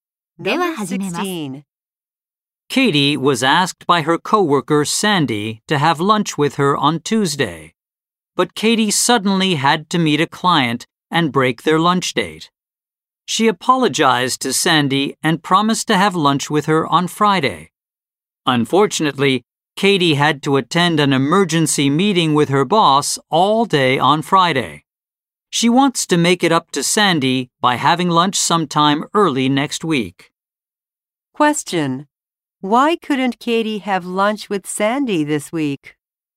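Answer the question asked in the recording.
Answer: She had to meet a client and then attend an emergency meeting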